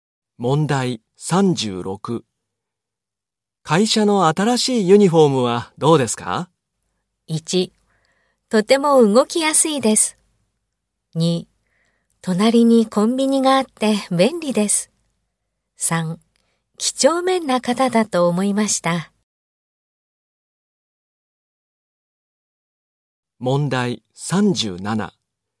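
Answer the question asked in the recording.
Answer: 1: とても動きやすいです。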